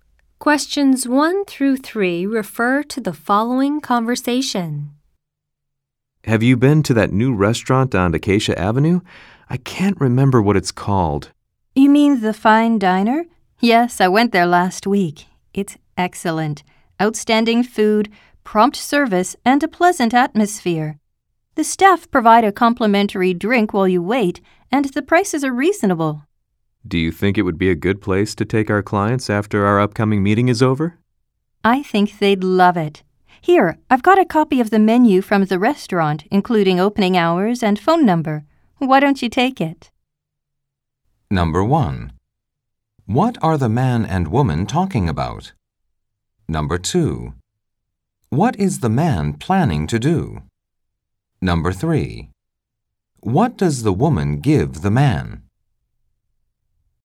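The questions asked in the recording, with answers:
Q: What are the man and woman talking about?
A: A new restaurant on Acacia Avenue

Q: What is the man planning to do?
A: Take clients to the restaurant after a meeting

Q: What does the woman give the man?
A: A copy of the restaurant's menu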